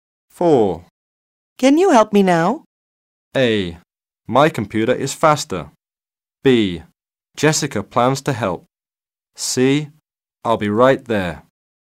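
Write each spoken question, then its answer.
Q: Can you help me now?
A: C: I'll be right there.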